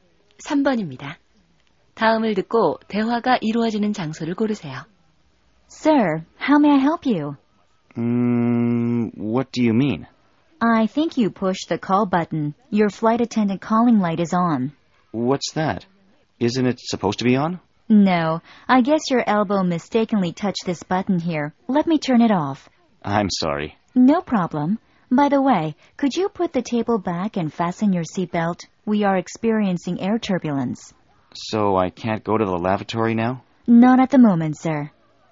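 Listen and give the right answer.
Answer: 비행기 안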